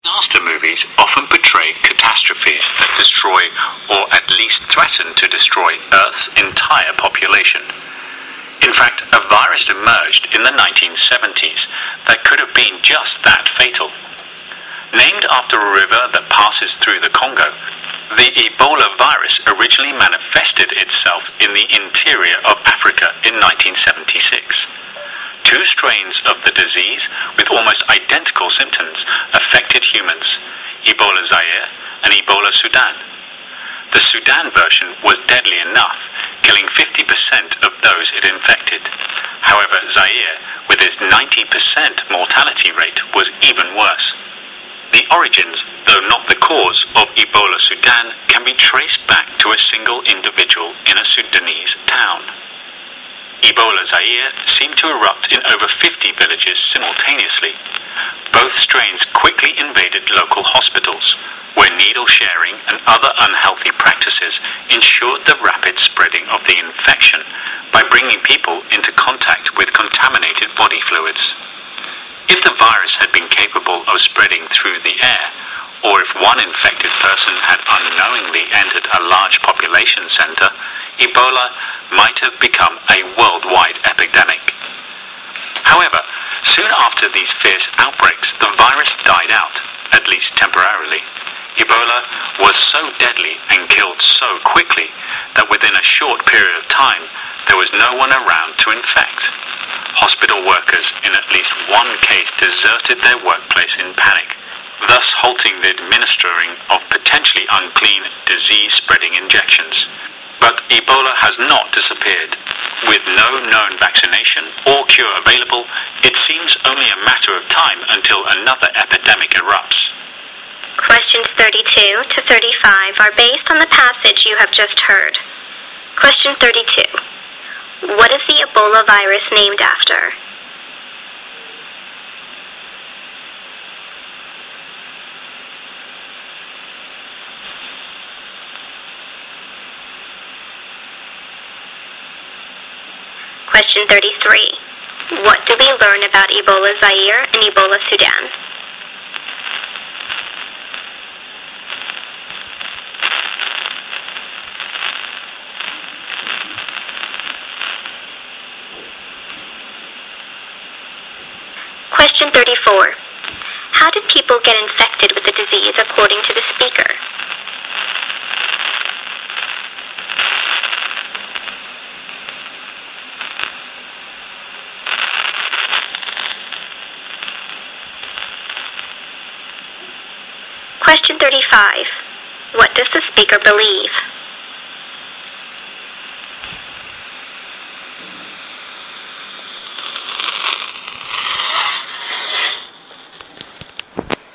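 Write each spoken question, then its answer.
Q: What is the Ebola virus named after?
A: A river that passes through the Congo

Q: How did people get infected with the disease according to the speaker?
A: Through contact with contaminated body fluids, such as by sharing needles in hospitals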